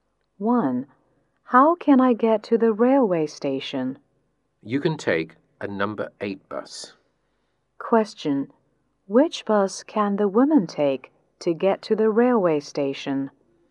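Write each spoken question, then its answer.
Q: Which bus can the woman take to get to the railway station?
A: A number 8 bus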